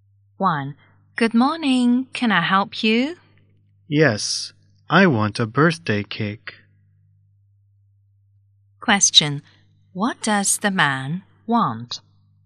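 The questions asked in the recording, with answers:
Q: What does the man want?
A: A birthday cake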